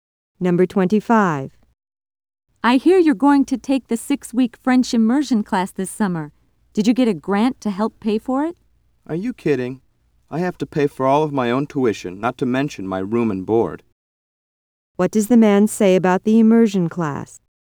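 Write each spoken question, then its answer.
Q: What does the man say about the immersion class?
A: He has to pay for all of it himself; he didn't get a grant.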